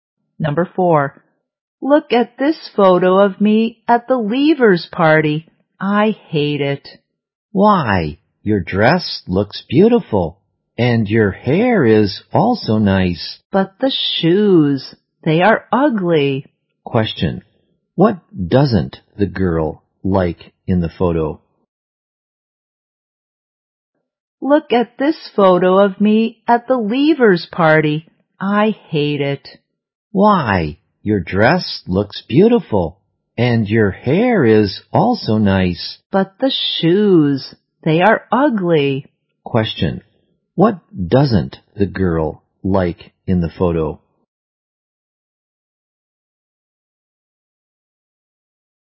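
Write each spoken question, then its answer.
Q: what doesn't the girl like in the photo?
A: Her shoes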